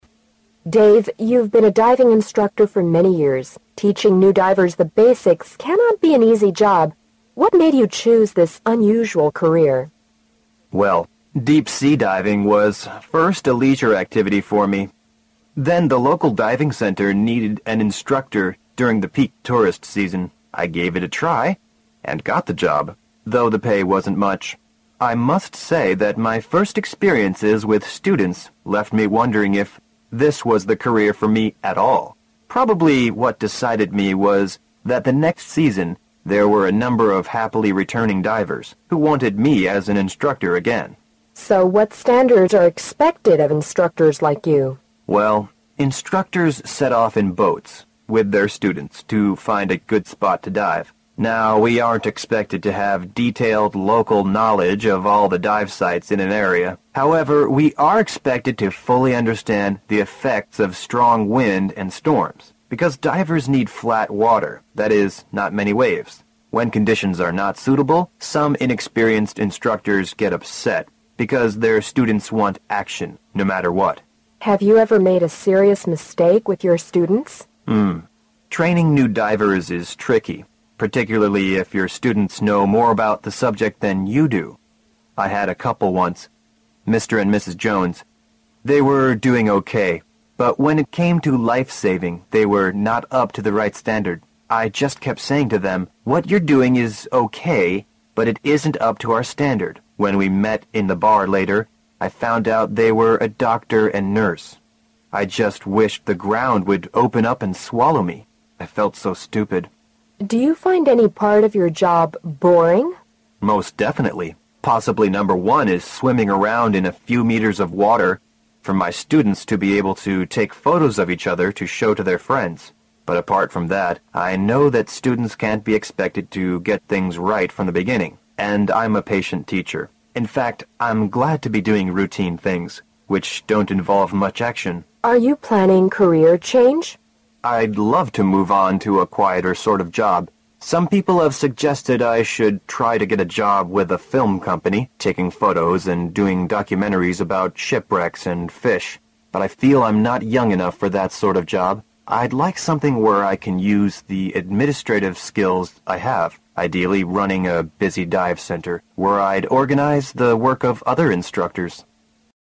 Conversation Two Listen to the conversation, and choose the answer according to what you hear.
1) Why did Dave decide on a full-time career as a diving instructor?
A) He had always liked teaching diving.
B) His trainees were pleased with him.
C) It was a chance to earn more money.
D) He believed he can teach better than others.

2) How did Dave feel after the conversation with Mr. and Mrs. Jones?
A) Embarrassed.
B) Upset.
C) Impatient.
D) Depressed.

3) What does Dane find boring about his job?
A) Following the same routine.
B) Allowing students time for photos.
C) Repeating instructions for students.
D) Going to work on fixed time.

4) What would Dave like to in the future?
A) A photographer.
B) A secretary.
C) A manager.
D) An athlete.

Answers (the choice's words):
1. His trainees were pleased with him.
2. Embarrassed.
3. Allowing students time for photos.
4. A manager.

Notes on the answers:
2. 男士知道这对夫妻的身份之后有如下想法:I just wish the ground would open up and swallow me. I felt so stupid. 可知他当时十分尴尬。

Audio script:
[听力原文] W: Dave, you've been a diving instructor for many years, teaching the new divers the basics can not be an easy job. What made you choose this unusual career? M: Well, deep sea diving was first leisure activity for me. Then the local diving center needed an instructor during the peak tourist season. I gave it a try and got the job, though the pay wasn't much, I must say that my first experiences with students left me wondering if this was the career for me at all. Probably what decided me was that the next season, there were a number of happily returning divers who wanted me as an instructor again. W: So what standards are expected as instructors like you? M: Well, instructors set off in boats with their students to find a good spot to dive. Now we aren't expected to have detailed local knowledge of all the dive sites in an area. However, we are expected to fully understand the effects of strong wind and storms, because divers need fiat water, that is, not many waves. When conditions are not suitable, some inexperienced instructors get upset, because their students want action, no matter what. W: Have you ever made a serious mistake with your students? M: Ng, training new divers is tricky, particularly if the students know more about the subject than you do. I had a couple once, Mr. and Mrs. Jones. They were doing OK, but when it came to life saving, they were not up to the right standard. I just kept saying to them, "What you are doing is OK, but it isn't not up to our standard." When we met in the bar later, I found out they were a doctor and a nurse. I just wish the ground would open up and swallow me. I felt so stupid. W: Do you find any part of your job boring? M: Most definitely. Possibly number one is swimming around in a few meters of water, for my students to be able to take photos of each other to show to their friends. But apart from that, I know that students can't be expected to get things right from the beginning and I am a patient teacher. In fact, I am glad to be doing routine things which don't involve much action. W: Are you planning career change? M: I'd love to move on to a quiter sort of job. Some people have suggested that I should try to get a job with a film company, taking photos and doing documentaries about ship wrecks and fish. But I feel I am not young enough for that sort of job. I'd like something where I can use the administrative skills I have. I'd like running a busy dive center, where I'd organize the work of other instructors.